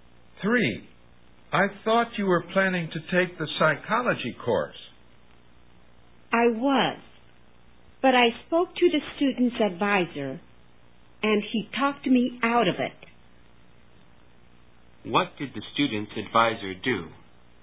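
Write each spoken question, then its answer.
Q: What did the student's advisor do?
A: He persuaded the student not to take the psychology course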